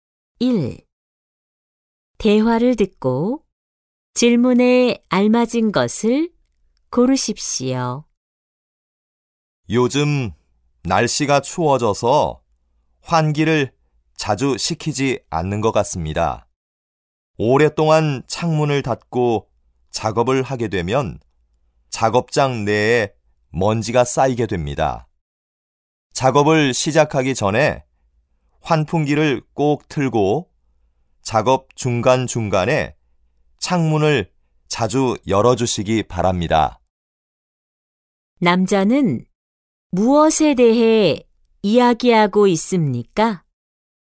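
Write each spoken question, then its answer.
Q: 남자는 무엇에 대해 이야기하고 있습니까?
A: 작업장 환기(창문을 자주 열고 환풍기를 트는 것)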